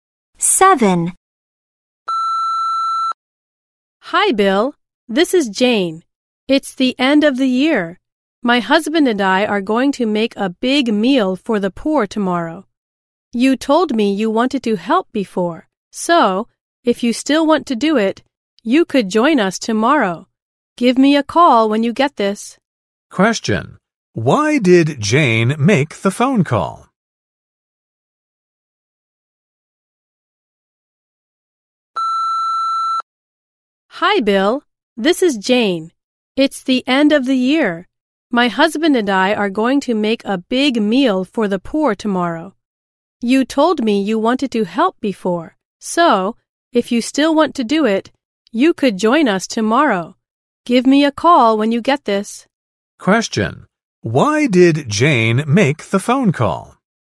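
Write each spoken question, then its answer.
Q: Why did Jane make the phone call?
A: To invite Bill to join them in making a big meal for the poor tomorrow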